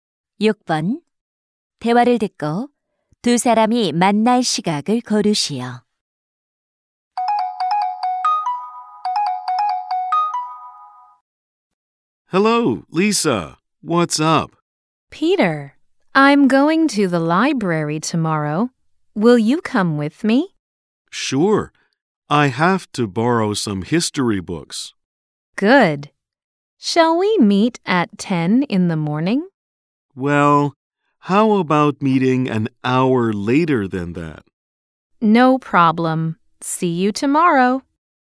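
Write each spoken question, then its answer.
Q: 대화를 듣고 두 사람이 만날 시각을 고르시오.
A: 오전 11시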